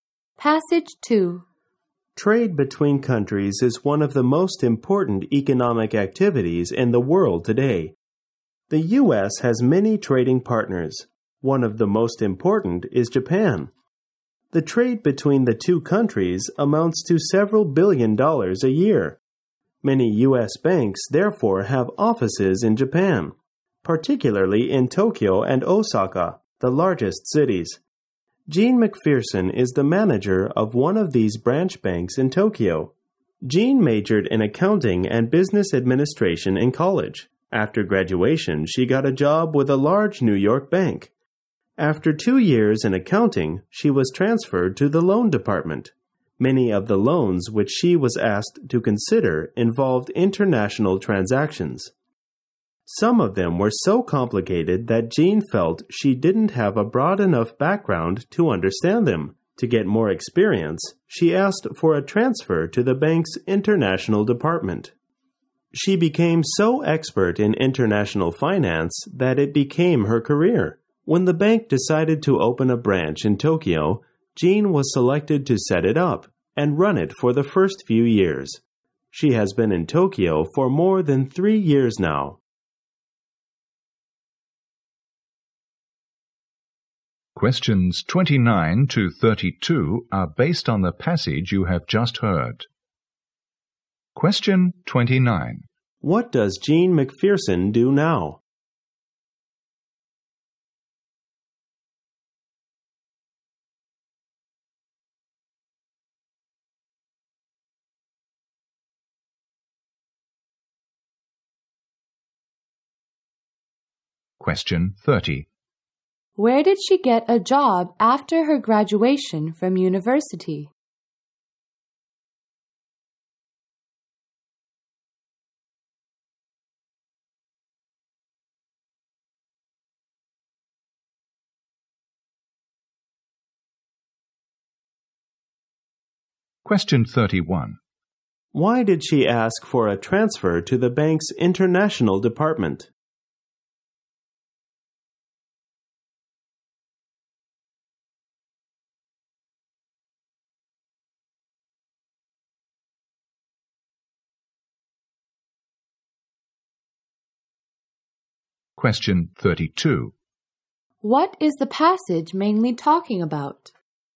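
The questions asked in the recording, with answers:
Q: What does Gene McPherson do now?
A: She manages a U.S. bank branch in Tokyo

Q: Where did she get a job after her graduation from university?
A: At a large New York bank

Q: Why did she ask for a transfer to the bank's international department?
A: To get more experience

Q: What is the passage mainly talking about?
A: Gene McPherson's career in international banking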